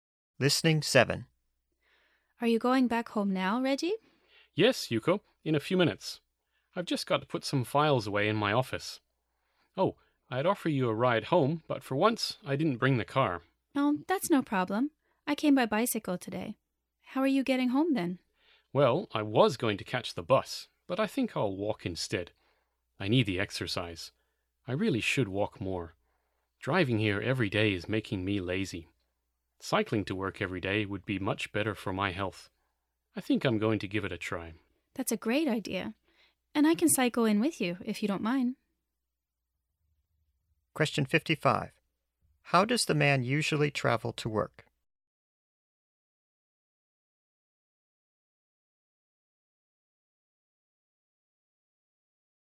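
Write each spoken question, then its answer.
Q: How does the man usually travel to work?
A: He drives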